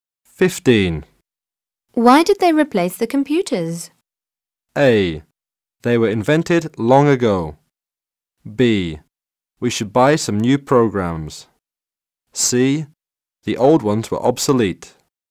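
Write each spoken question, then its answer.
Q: Why did they replace the computers?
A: C: The old ones were obsolete.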